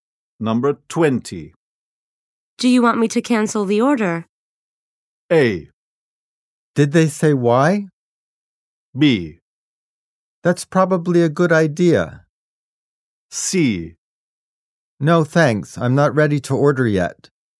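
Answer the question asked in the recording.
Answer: B: That's probably a good idea.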